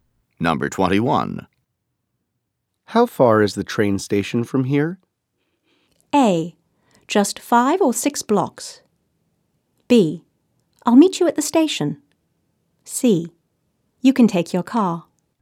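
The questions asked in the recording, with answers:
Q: How far is the train station from here?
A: A: Just 5 or 6 blocks.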